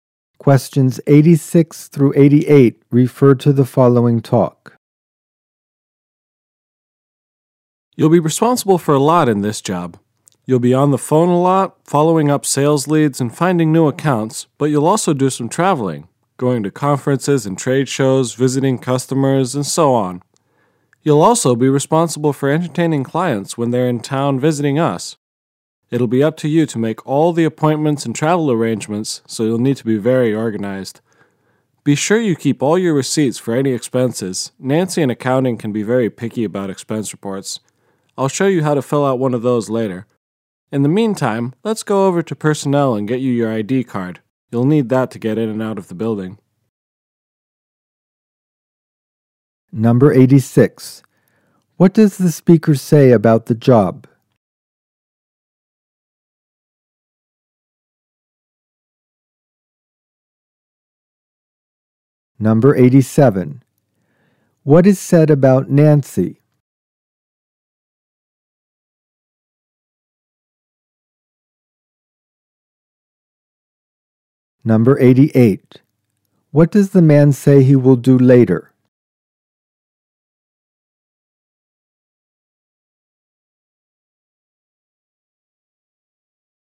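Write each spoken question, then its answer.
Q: What is said about Nancy?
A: She is very picky about expense reports

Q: What does the man say he will do later?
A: Show how to fill out an expense report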